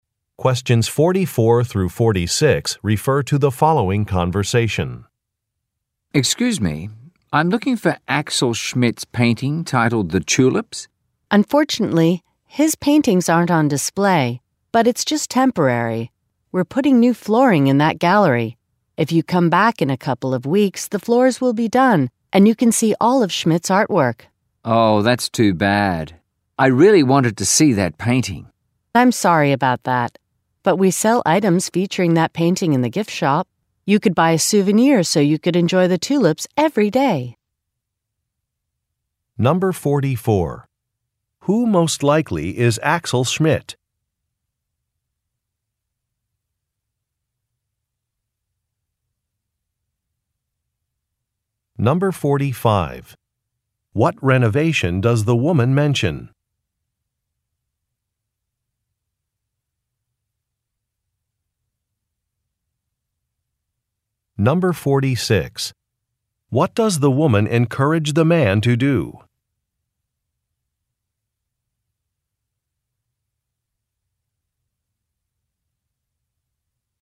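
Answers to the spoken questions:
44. A painter
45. New flooring is being put in the gallery
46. Buy a souvenir featuring the painting at the gift shop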